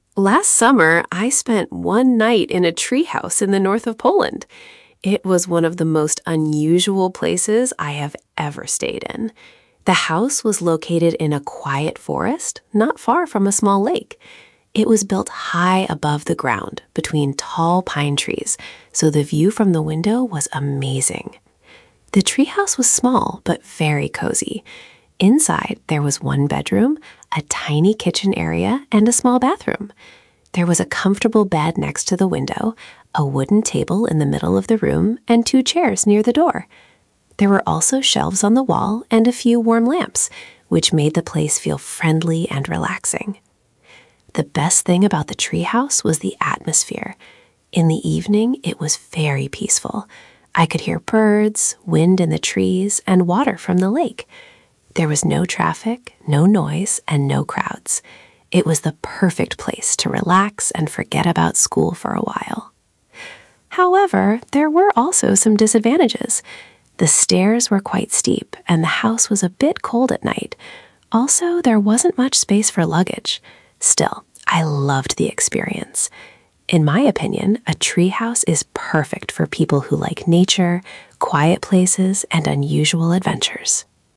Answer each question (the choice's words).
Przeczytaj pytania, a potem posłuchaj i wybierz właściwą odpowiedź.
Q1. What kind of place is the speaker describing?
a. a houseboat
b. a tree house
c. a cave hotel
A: a tree house

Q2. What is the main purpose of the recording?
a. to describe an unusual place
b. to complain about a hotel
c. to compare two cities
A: to describe an unusual place

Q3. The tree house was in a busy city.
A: False

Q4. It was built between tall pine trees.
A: True

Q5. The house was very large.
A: False

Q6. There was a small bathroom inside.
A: True

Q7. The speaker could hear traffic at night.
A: False

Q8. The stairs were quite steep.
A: True

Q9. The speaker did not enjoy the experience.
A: False

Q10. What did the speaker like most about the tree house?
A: The speaker liked the peaceful atmosphere most.

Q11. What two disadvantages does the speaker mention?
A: The stairs were steep, the house was cold at night, and there was not much space for luggage.

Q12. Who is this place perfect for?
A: It is perfect for people who like nature, quiet places and unusual adventures.

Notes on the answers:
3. it was in a quiet forest.
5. it was small but cosy.
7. there was no traffic or noise.
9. "I loved the experience."

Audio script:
Last summer, I spent one night in a tree house in the north of Poland. It was one of the most unusual places I have ever stayed in. The house was located in a quiet forest, not far from a small lake. It was built high above the ground, between tall pine trees, so the view from the window was amazing.
The tree house was small, but very cosy. Inside, there was one bedroom, a tiny kitchen area and a small bathroom. There was a comfortable bed next to the window, a wooden table in the middle of the room and two chairs near the door. There were also shelves on the wall and a few warm lamps, which made the place feel friendly and relaxing.
The best thing about the tree house was the atmosphere. In the evening, it was very peaceful. I could hear birds, wind in the trees and water from the lake. There was no traffic, no noise and no crowds. It was the perfect place to relax and forget about school for a while.
However, there were also some disadvantages. The stairs were quite steep, and the house was a bit cold at night. Also, there wasn't much space for luggage. Still, I loved the experience. In my opinion, a tree house is perfect for people who like nature, quiet places and unusual adventures.

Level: A2+/B1